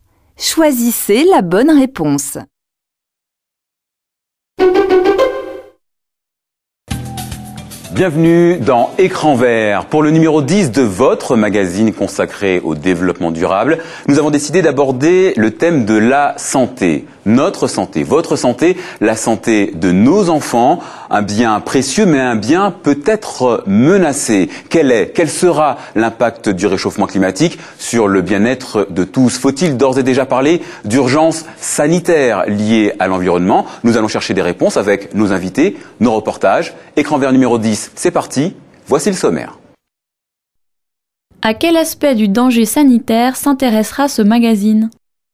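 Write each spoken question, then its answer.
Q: À quel aspect du danger sanitaire s'intéressera ce magazine?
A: L'impact de l'environnement (du réchauffement climatique) sur la santé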